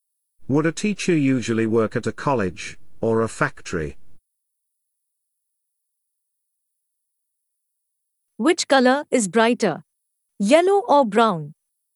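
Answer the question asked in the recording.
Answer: a college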